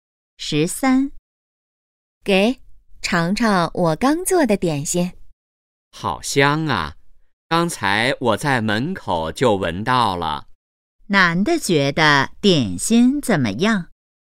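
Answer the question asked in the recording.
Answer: 很香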